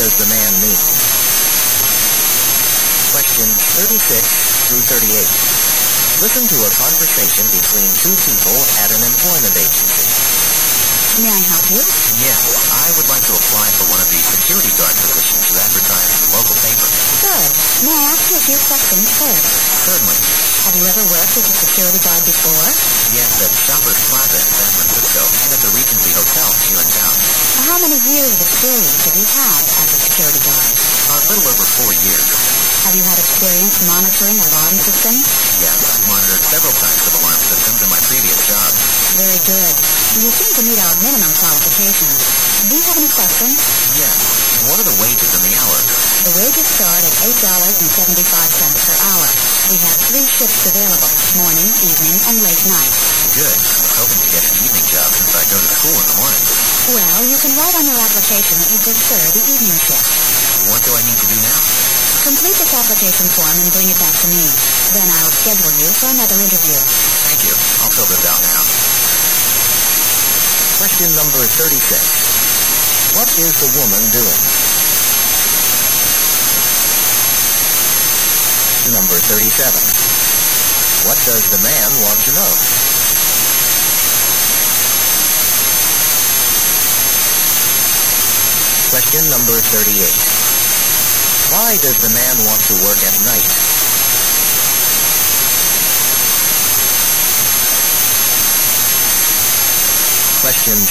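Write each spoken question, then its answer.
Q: What is the woman doing?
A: Interviewing a job applicant

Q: What does the man want to know?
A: The wages and hours

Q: Why does the man want to work at night?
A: He goes to school in the morning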